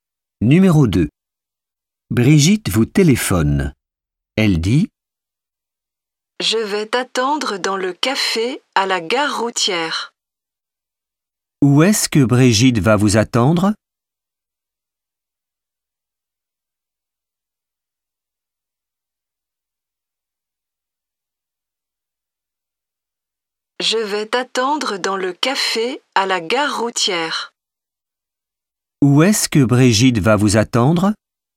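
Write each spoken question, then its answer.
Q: Où est-ce que Brigitte va vous attendre?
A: Dans le café à la gare routière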